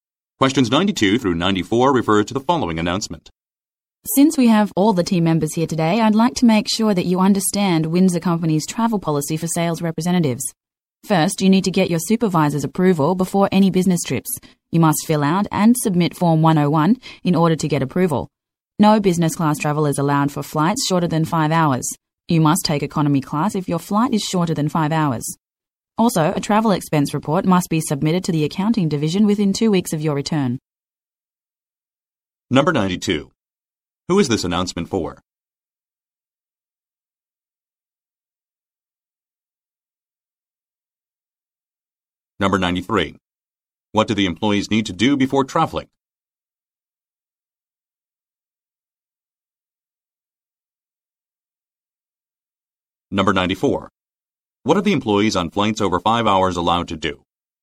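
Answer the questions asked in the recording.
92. Sales representatives
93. Get their supervisor's approval by submitting Form 101
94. Travel business class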